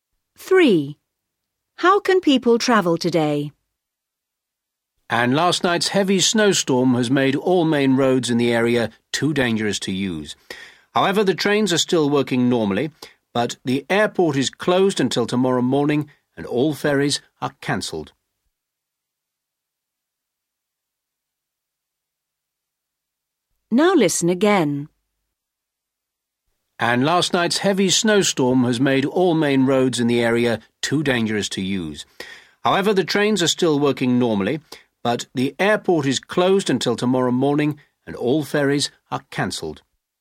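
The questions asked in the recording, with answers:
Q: How can people travel today?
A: By train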